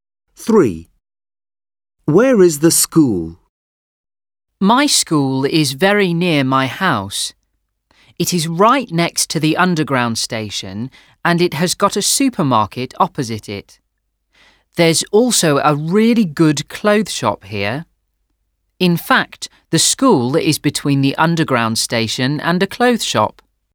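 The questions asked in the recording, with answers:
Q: Where is the school?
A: Between the underground station and a clothes shop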